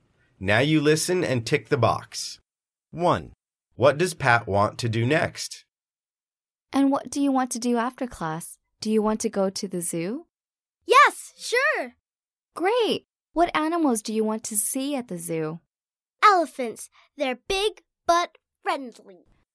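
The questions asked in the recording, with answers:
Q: What does Pat want to do next?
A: go to the zoo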